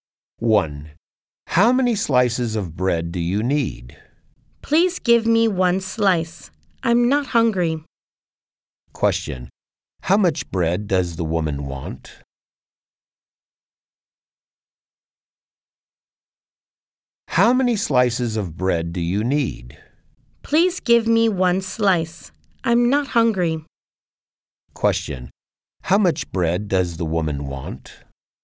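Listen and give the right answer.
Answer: One slice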